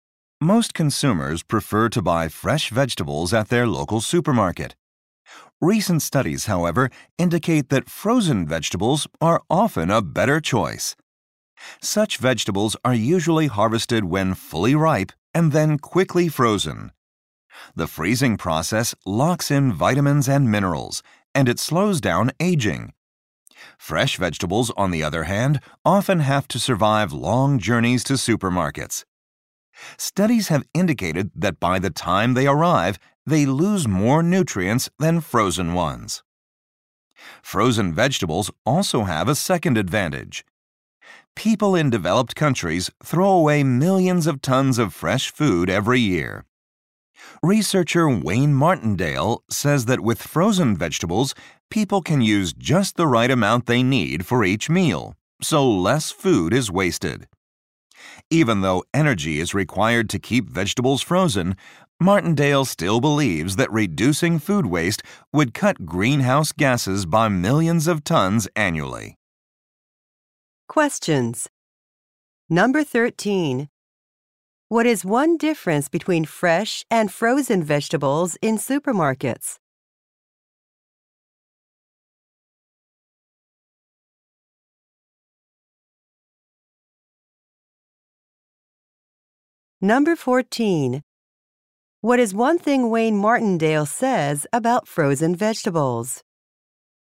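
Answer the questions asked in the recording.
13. Frozen vegetables often keep more nutrients than fresh ones.
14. They reduce food waste, which would cut greenhouse gases.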